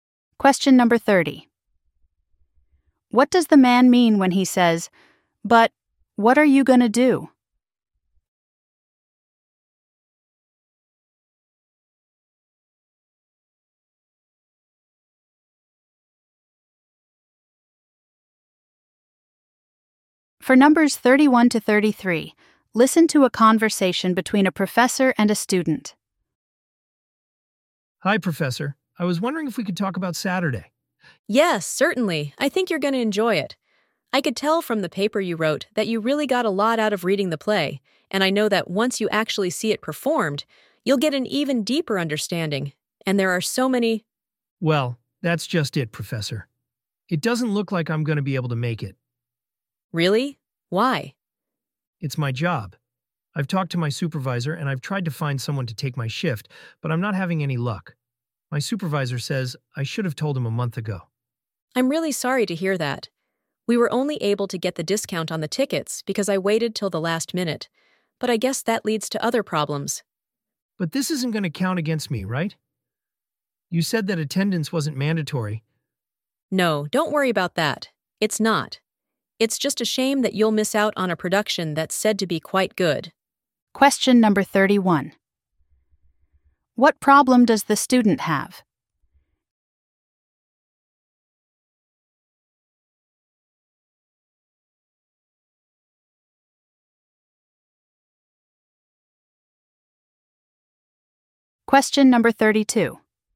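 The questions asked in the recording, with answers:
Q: What problem does the student have?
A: He has to work and can't attend the play on Saturday

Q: Why did the professor wait to buy the tickets?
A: To get a discount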